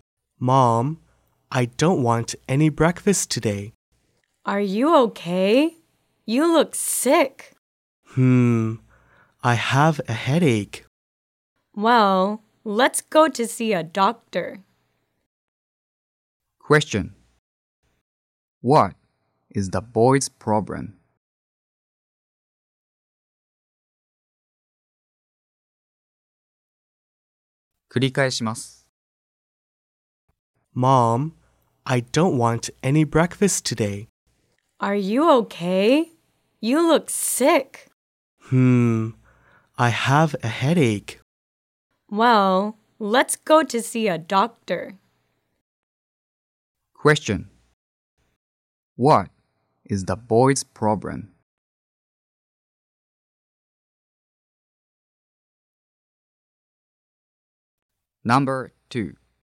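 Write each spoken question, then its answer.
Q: What is the boy's problem?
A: He has a headache.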